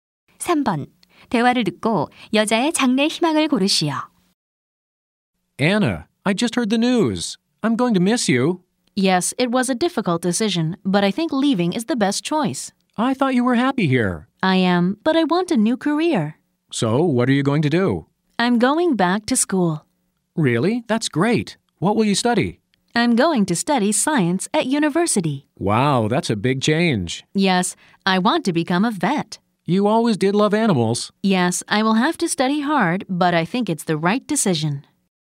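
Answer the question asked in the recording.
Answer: 수의사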